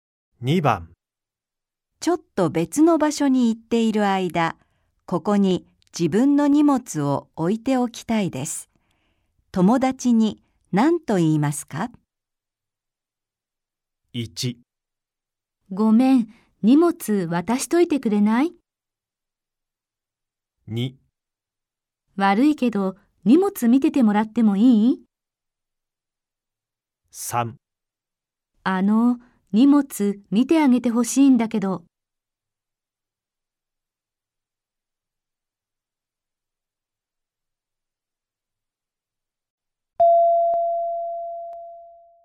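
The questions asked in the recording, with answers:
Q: ちょっと別の場所に行っている間、ここに自分の荷物を置いておきたいです。 友達に何と言いますか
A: 2: 悪いけど、荷物見ててもらってもいい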